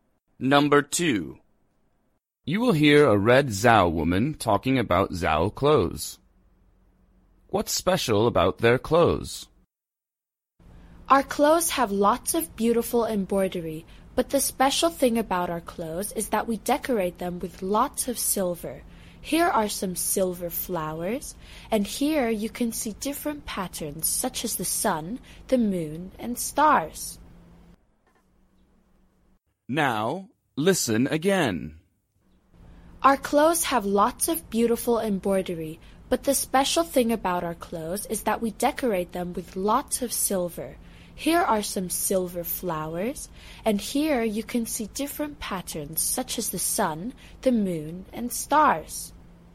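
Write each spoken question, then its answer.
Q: What's special about their clothes?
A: They are decorated with lots of silver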